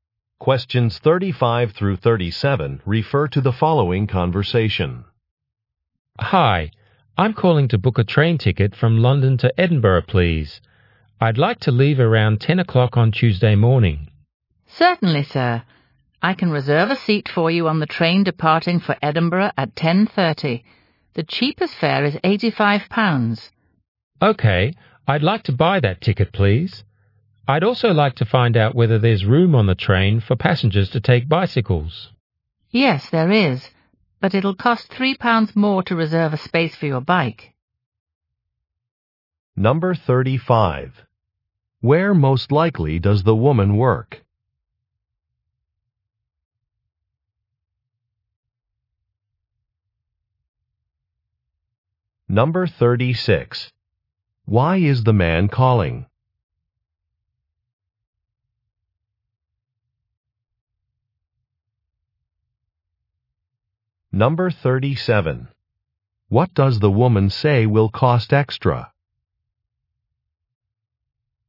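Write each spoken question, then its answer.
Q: Where most likely does the woman work?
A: At a train ticket office

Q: Why is the man calling?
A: To book a train ticket from London to Edinburgh

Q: What does the woman say will cost extra?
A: Reserving a space for a bicycle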